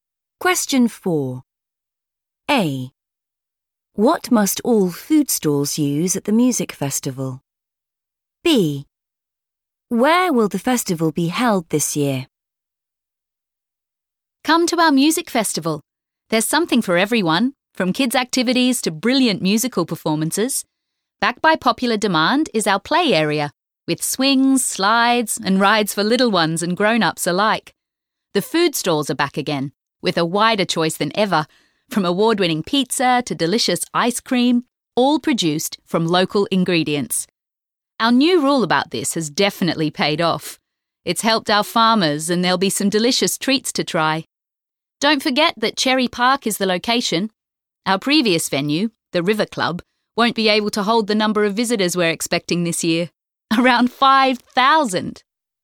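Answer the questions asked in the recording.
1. local ingredients
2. Cherry Park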